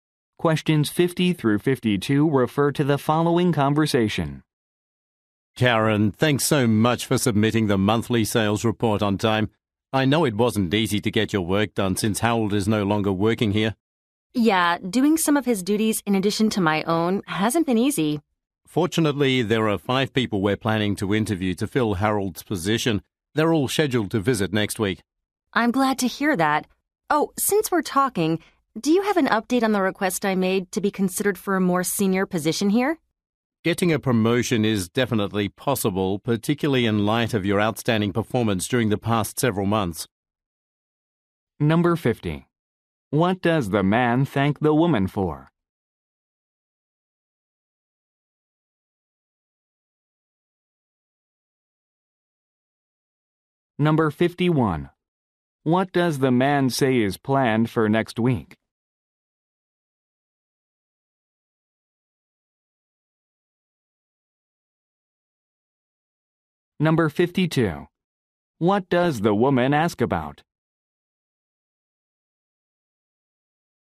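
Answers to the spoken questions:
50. Submitting the monthly sales report on time.
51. Job interviews for Harold's position.
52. Her request for a promotion.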